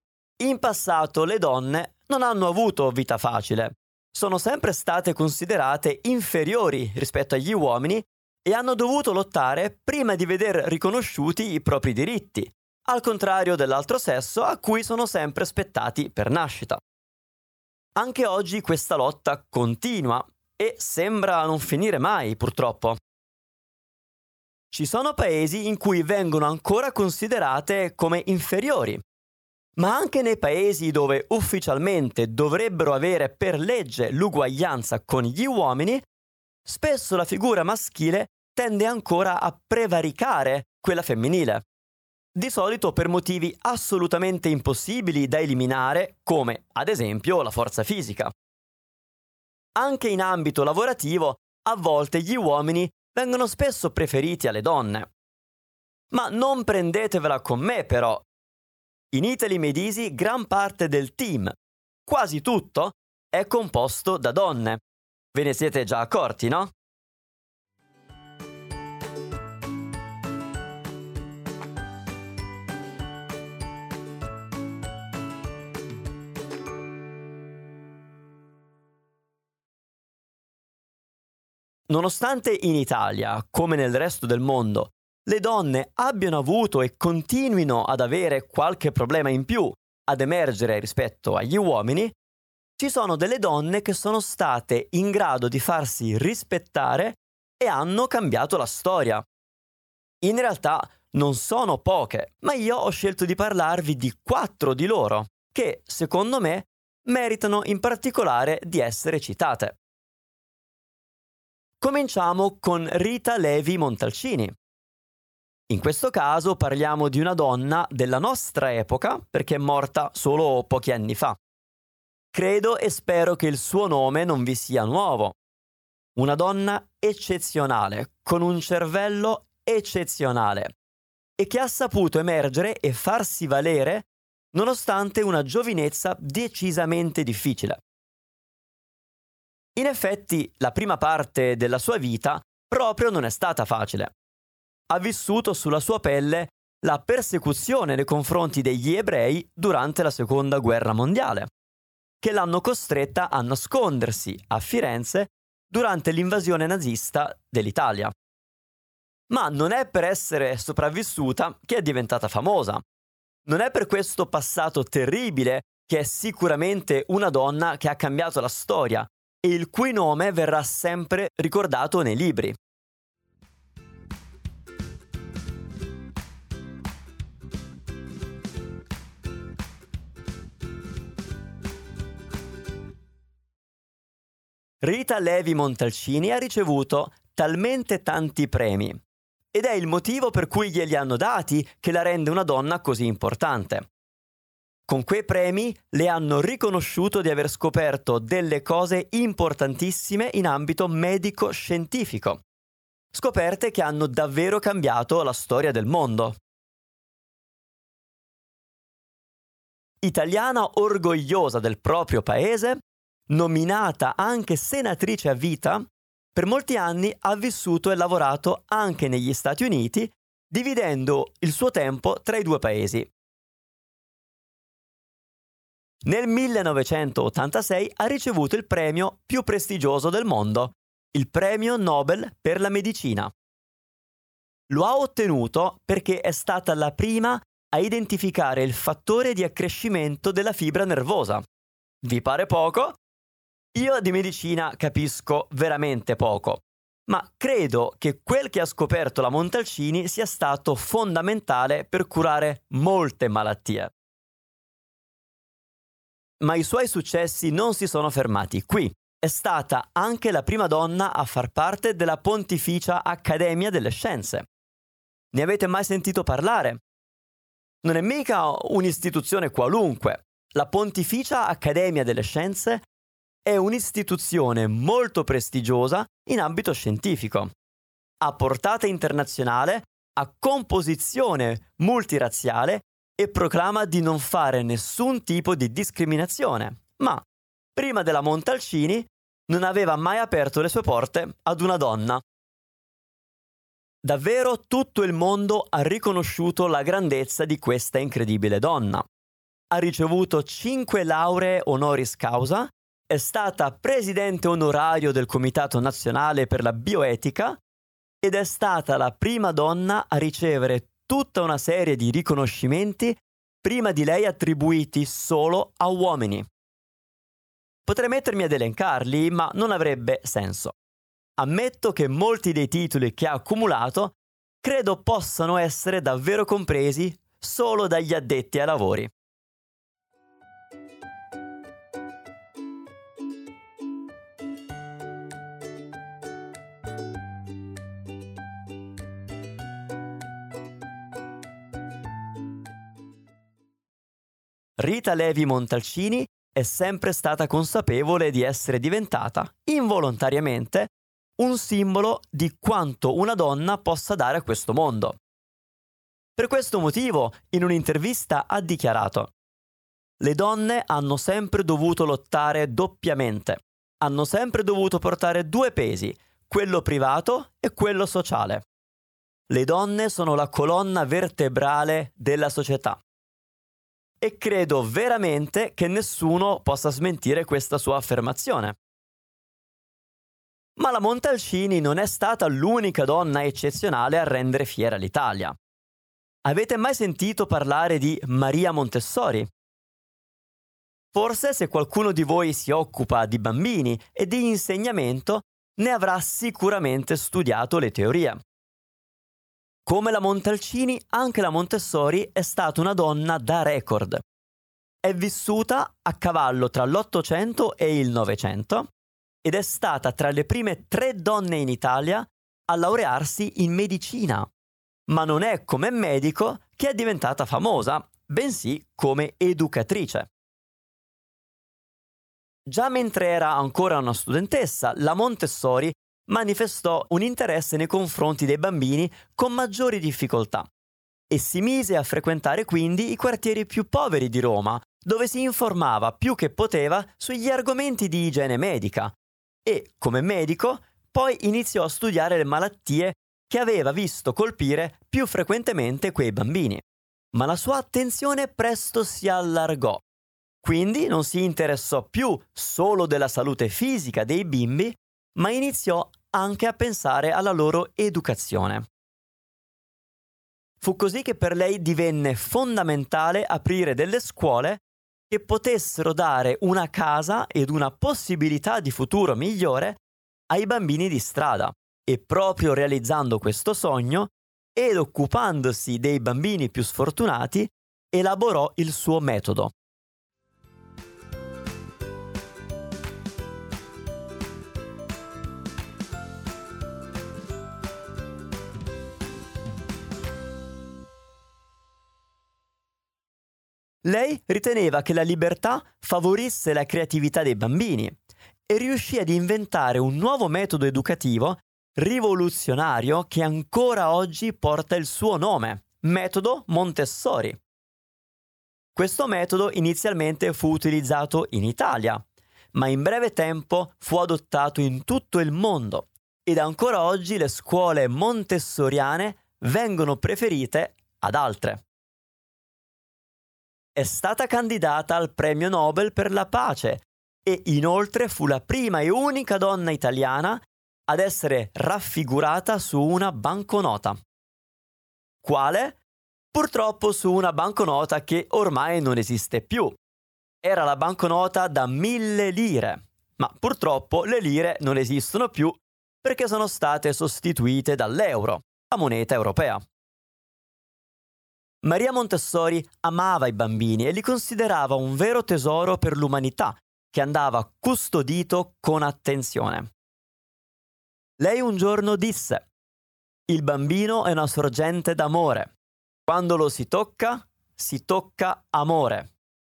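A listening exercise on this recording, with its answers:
Here are your TRUE/ FALSE Comprehension questions.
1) Le donne hanno sempre avuto gli stessi diritti degli uomini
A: Falso

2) Rita Levi Montalcini ha avuto una vita facile e comoda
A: Falso

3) Rita Levi Montalcini è stata premiata molte volte per le sue scoperte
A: Vero

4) Maria Montessori è un medico attualmente ancora vivente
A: Falso

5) Il "metodo Montessori" viene usato solo in Italia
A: Falso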